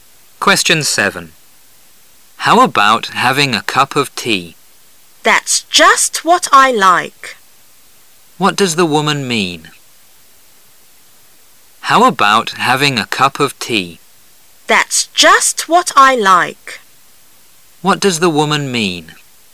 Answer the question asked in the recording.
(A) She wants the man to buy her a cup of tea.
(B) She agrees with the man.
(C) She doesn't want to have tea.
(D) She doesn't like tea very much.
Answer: (B) She agrees with the man.

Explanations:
观点态度题。That's just what l like表示"我刚好也这样想",由此可知女士同意男士的提议。